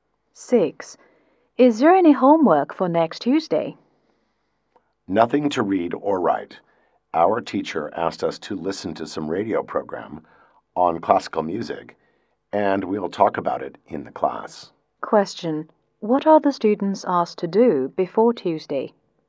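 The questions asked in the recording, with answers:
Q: What are the students asked to do before Tuesday?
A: Listen to a radio program on classical music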